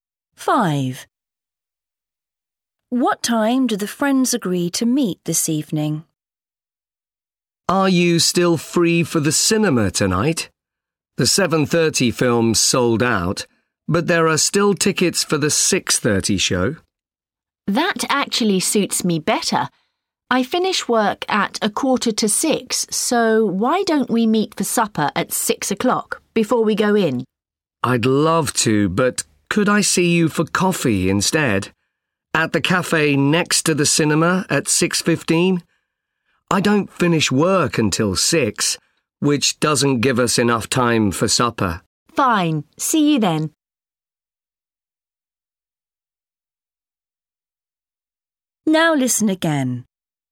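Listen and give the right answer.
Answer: 6:15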